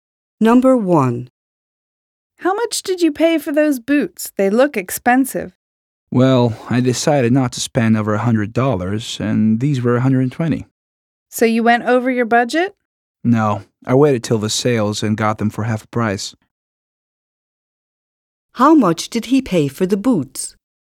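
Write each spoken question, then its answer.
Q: How much did he pay for the boots?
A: $60 (half of $120)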